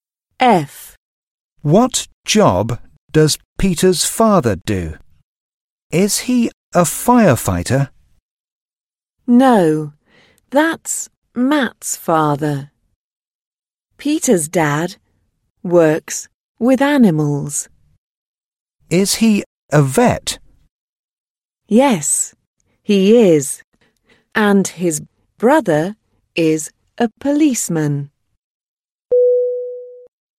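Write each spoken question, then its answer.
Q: What job does Peter's father do?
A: a vet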